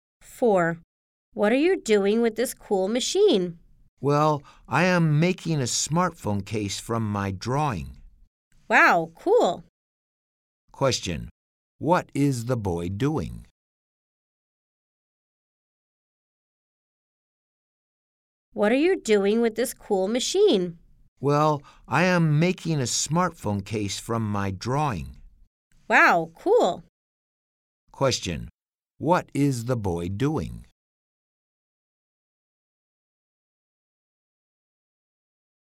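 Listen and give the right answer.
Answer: Making a smartphone case from his drawing.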